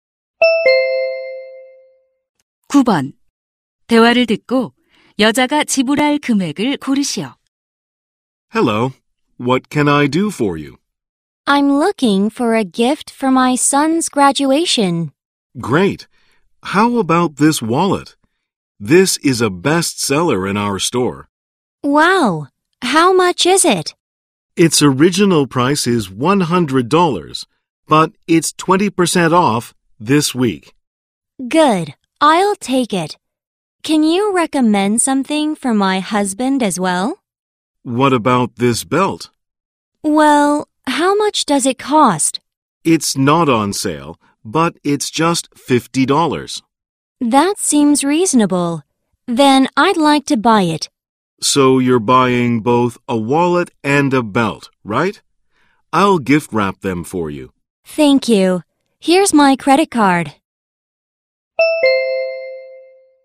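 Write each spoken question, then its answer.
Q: 대화를 듣고 여자가 지불할 금액을 고르시오.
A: $130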